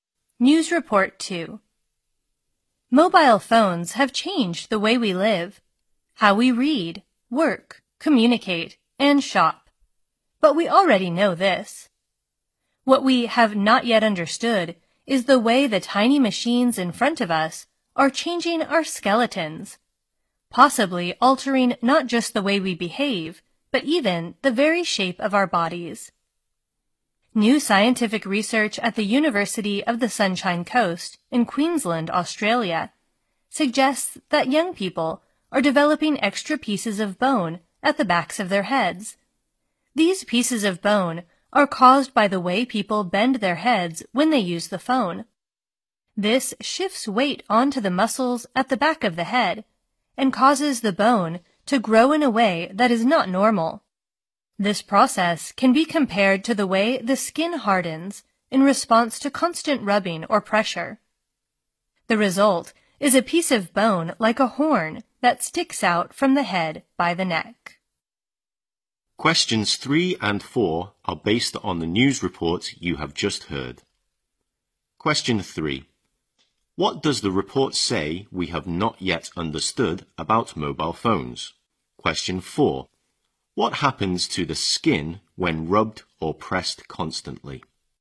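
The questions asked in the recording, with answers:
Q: What does the report say we have not yet understood about mobile phones?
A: How they are changing our skeletons and possibly the shape of our bodies

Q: What happens to the skin when rubbed or pressed constantly?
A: It hardens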